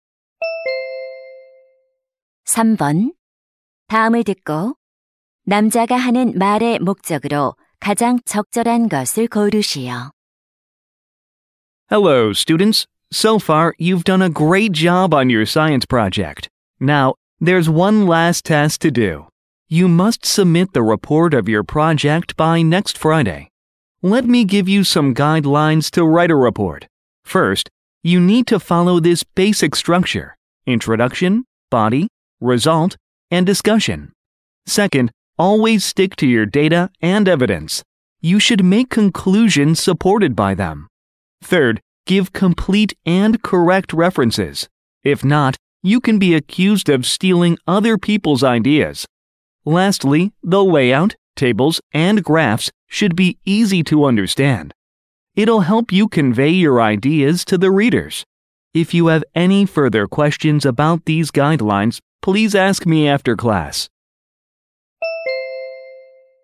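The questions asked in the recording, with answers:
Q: 다음을 듣고 남자가 하는 말의 목적으로 가장 적절한 것을 고르시오.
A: 과학 프로젝트 보고서 작성 지침을 안내하려고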